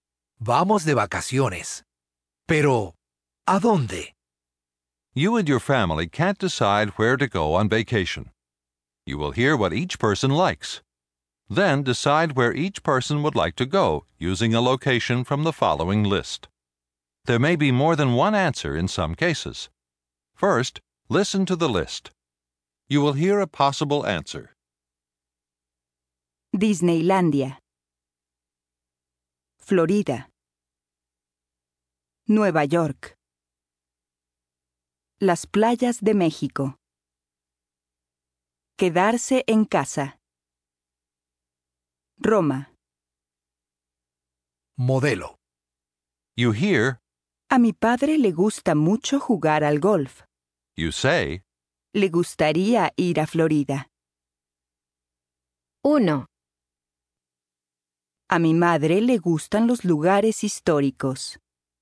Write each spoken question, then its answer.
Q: A mi madre le gustan los lugares históricos.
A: Le gustaría ir a Roma.